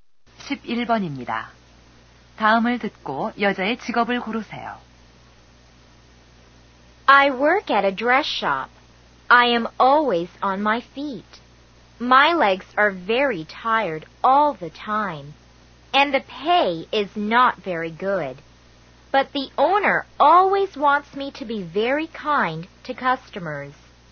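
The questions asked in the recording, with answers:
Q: 다음을 듣고 여자의 직업을 고르세요.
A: 옷가게 점원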